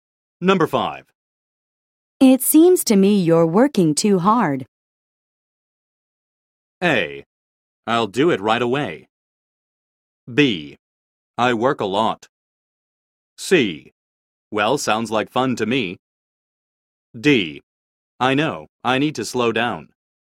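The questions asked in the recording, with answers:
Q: It seems to me you're working too hard.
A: D: I know, I need to slow down.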